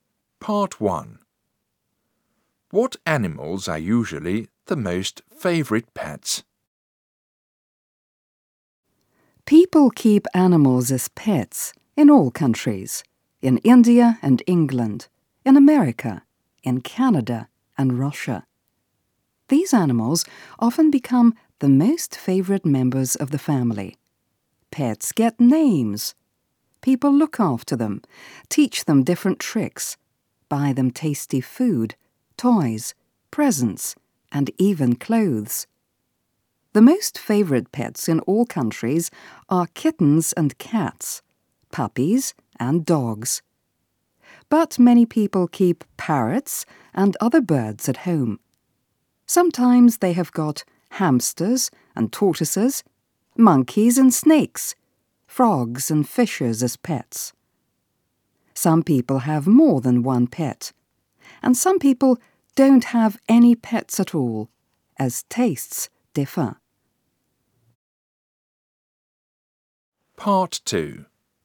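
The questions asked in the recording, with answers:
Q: What animals are usually the most favourite pets?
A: Kittens and cats, puppies and dogs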